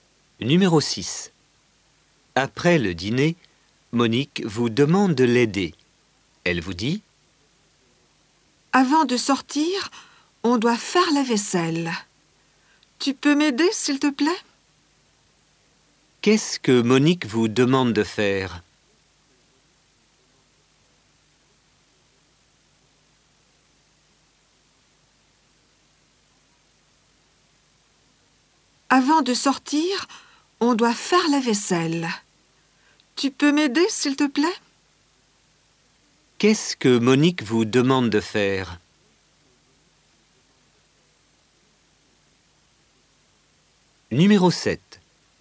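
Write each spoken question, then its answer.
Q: Qu'est-ce que Monique vous demande de faire?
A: De l'aider à faire la vaisselle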